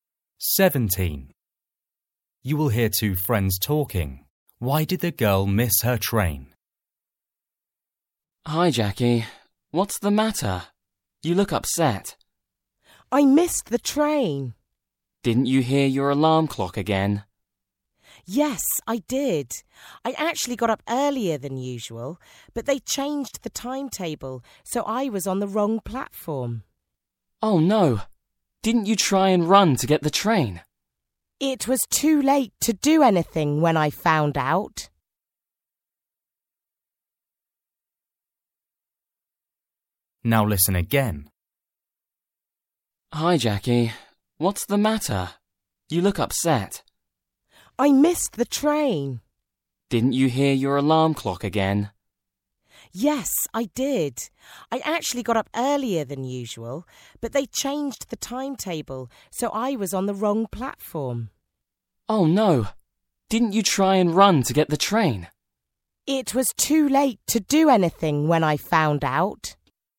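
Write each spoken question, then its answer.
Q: Why did the girl miss her train?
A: They changed the timetable, so she was on the wrong platform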